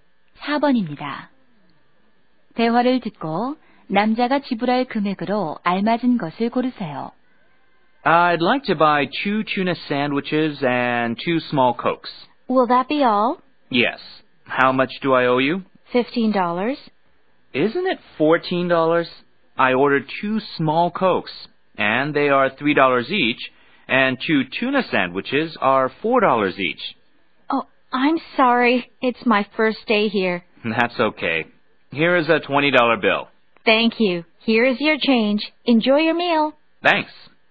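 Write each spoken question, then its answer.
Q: 대화를 듣고 남자가 지불할 금액으로 알맞은 것을 고르세요.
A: 14달러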